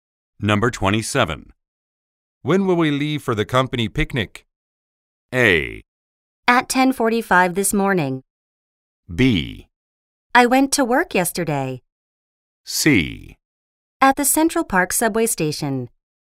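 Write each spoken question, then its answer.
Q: When will we leave for the company picnic?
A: A: At 10:45 this morning.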